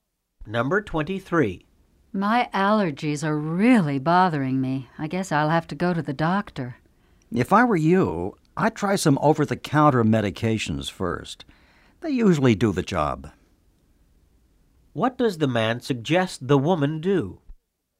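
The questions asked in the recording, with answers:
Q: What does the man suggest the woman do?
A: Try some over-the-counter medications first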